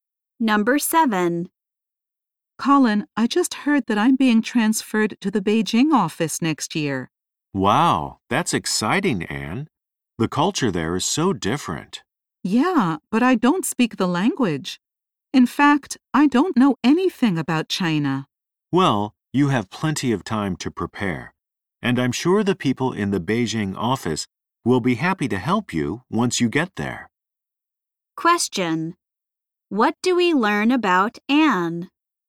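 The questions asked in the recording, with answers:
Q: What do we learn about Anne?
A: She is being transferred to Beijing but doesn't speak the language.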